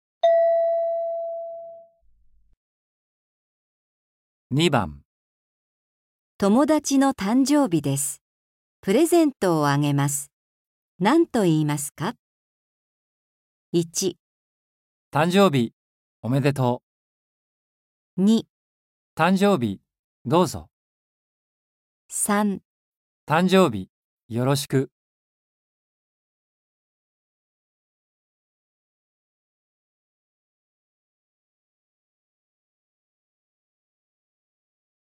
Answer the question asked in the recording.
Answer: 1

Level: 初級